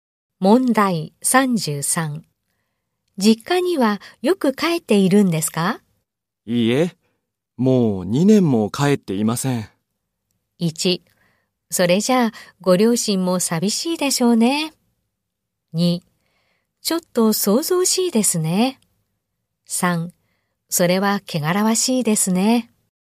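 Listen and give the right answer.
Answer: 1: それじゃあご両親も寂しいでしょうね。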